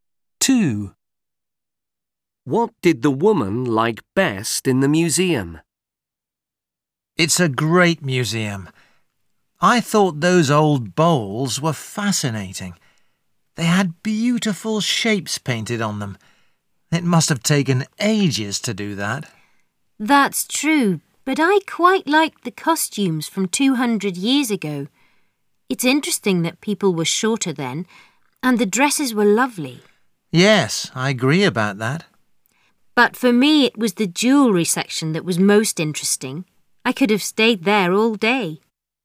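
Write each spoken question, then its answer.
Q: What did the woman like best in the museum?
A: The jewellery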